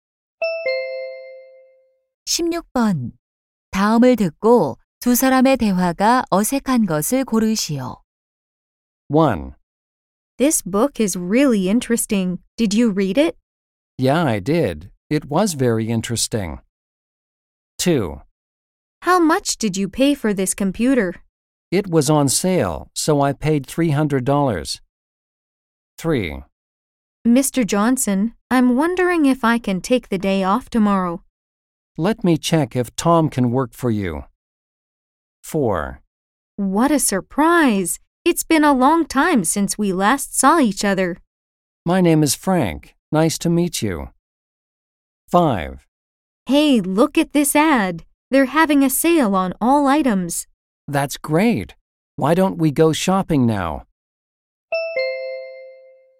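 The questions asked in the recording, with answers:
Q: 다음을 듣고 두 사람의 대화가 어색한 것을 고르시오.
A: 4: What a surprise! It's been a long time since we last saw each other. / My name is Frank. Nice to meet you.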